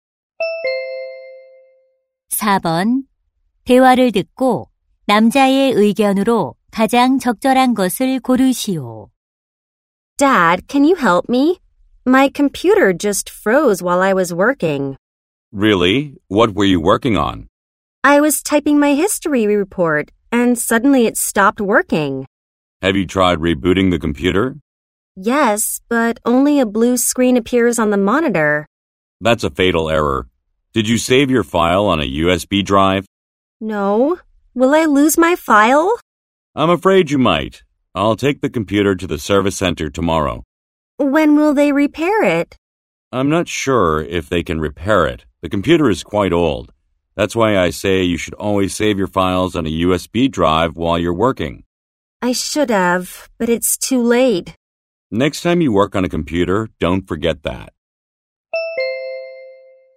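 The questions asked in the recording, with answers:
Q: 대화를 듣고 남자의 의견으로 가장 적절한 것을 고르시오.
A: 컴퓨터 작업 중에는 항상 파일을 USB에 저장해야 한다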